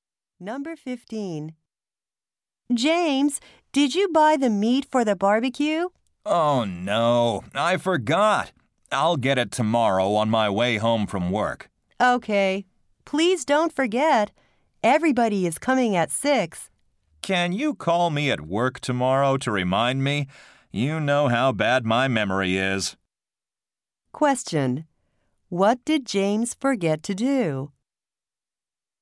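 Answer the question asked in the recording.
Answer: Buy the meat for the barbecue.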